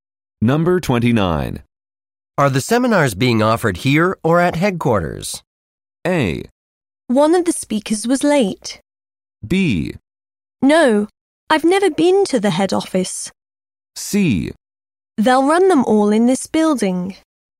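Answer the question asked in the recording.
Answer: C: They'll run them all in this building.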